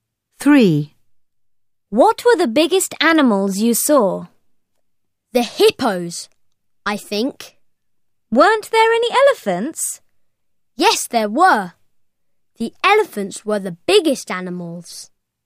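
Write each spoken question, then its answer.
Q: What were the biggest animals you saw?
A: elephants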